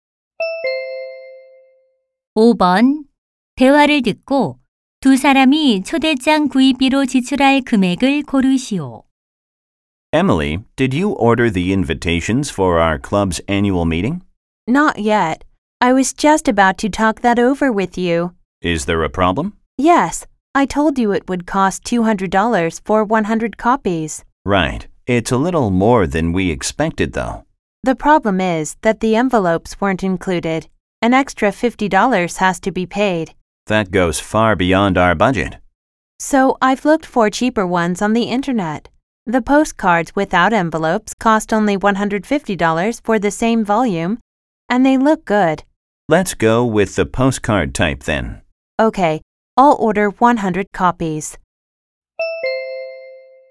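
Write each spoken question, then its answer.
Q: 대화를 듣고 두 사람이 초대장 구입비로 지출할 금액을 고르시오.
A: 150달러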